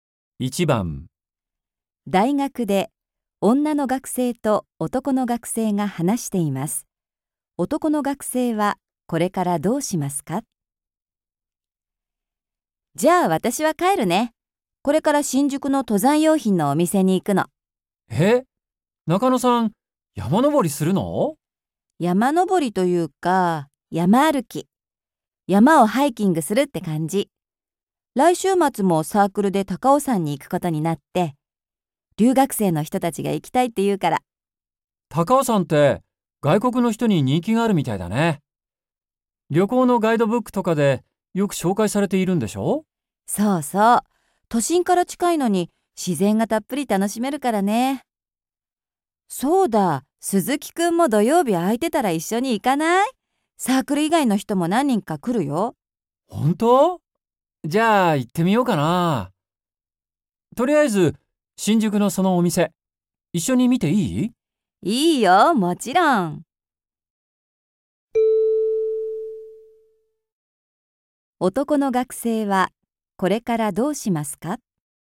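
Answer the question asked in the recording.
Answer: 女の学生と一緒に新宿の登山用品の店に行く

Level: N2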